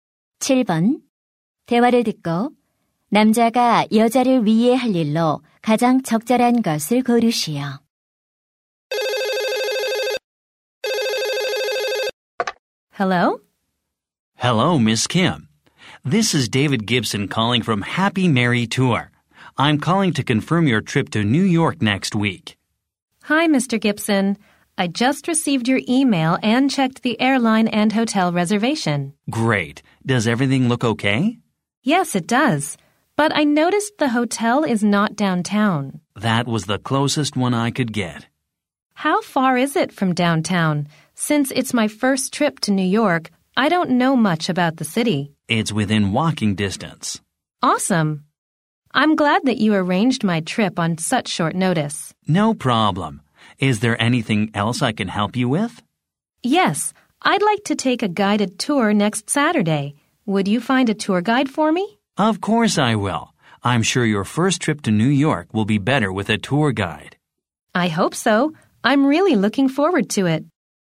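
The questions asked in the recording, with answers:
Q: 대화를 듣고 남자가 여자를 위해 할 일로 가장 적절한 것을 고르시오.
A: 여행 가이드 구해 주기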